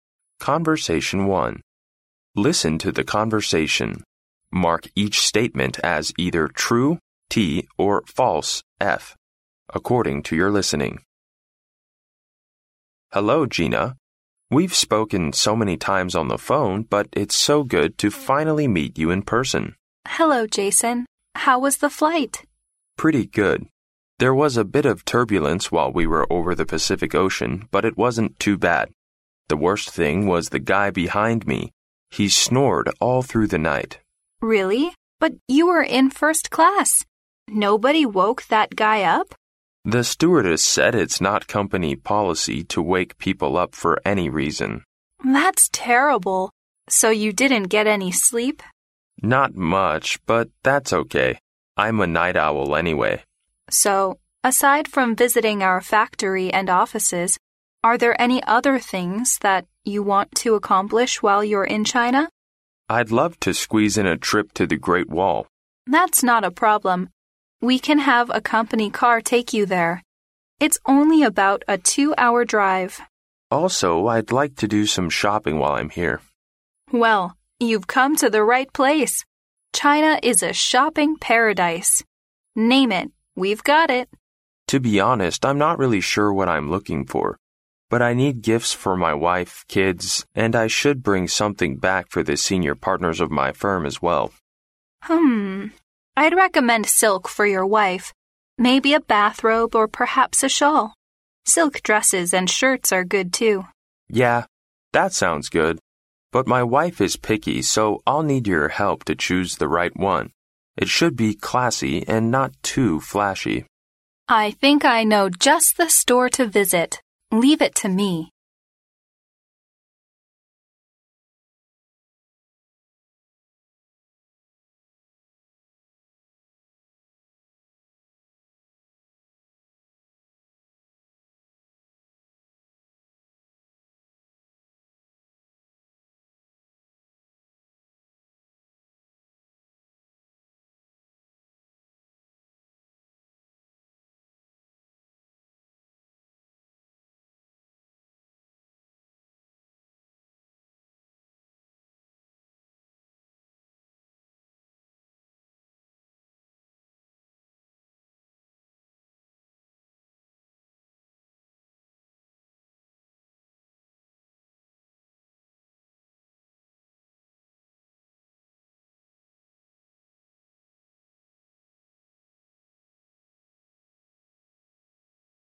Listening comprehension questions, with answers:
Listen to the conversation, and mark each statement as either true (T) or false (F) according to your listening.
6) Gina and Jason are old friends and they are quite happy to meet in China again.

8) Jason did not care much about the noise in the plane because he was a night owl.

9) Jason would like to pay a visit to the Great Wall besides doing his business.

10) Gina recommends that Jason may buy some silk products for his wife as gifts.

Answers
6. F
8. T
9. T
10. T

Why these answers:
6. 对话开头Jason说他和Gina曾经通话过很多次,最后终于在现实中见面,感觉很好。由此可知这是两人第一次见面,而非老朋友。因此该判断错误。
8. 对话中Jason说他的后座一整夜都在打鼾,Gina问起他是不是晚上完全没睡着觉时,他回答说"Not much...but that's OK...I'm a night owl anyway."由此可知后座打鼾对他造成的影响不太大,因为他自己是个夜猫子。因此该判断正确。
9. 对话中Gina问起除了参观工厂和办公室外还想做什么时,Jason说"I'd love to squeeze in a trip to the Great Wall."由此可知Jason除了工作方面的事,还想去长城看看。因此该判断正确。
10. 对话中Jason说想给妻子买礼物时,Gina说"I'd recommend silk for your wife.",并列举了一些丝绸制品。由此可知Gina推荐Jason给妻子买丝绸制品做礼物。因此该判断正确。

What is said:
M: Hello Gina! We've spoken so many times on the phone but it's so good to finally meet you in person!
W: Hello, Jason. How was the flight?
M: Pretty good. There was a bit of turbulence while we were over the Pacific Ocean, but it wasn't too bad. The worst thing was the guy behind me. He snored all through the night!
W: Really? But you were in first class! Nobody woke that guy up?
M: The stewardess said it's not company policy to wake people up for any reason.
W: That's terrible! So you didn't get any sleep?
M: Not much...but that's OK...I'm a night owl anyway.
W: So, aside from visiting our factory and offices, are there any other things you want to accomplish while you're in China?
M: I'd love to squeeze in a trip to the Great Wall.
W: That's not a problem. We can have a company car take you there. It's only about a two-hour drive.
M: Also...I'd like to do some shopping while I'm here.
W: Well, you've come to the right place! China is a shopping paradise. Name it―we've got it.
M: To be honest, I'm not really sure what I'm looking for. But I need gifts for my wife, kids and I should bring something back for the senior partners of my firm as well.
W: Hum...I'd recommend silk for your wife. Maybe a bathrobe or perhaps a shawl. Silk dresses and shirts are good, too.
M: Yeah...that sounds good. But my wife is picky, so I'll need your help to choose the right one. It should be classy and not too flashy.
W: I think I know just the store to visit. Leave it to me.